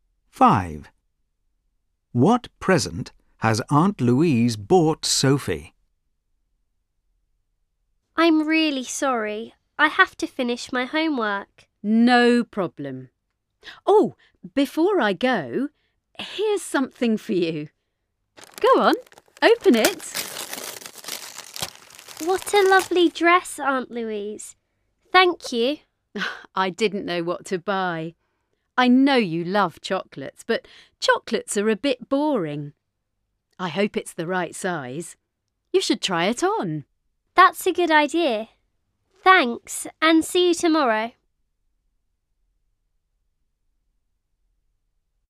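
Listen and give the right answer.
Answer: a dress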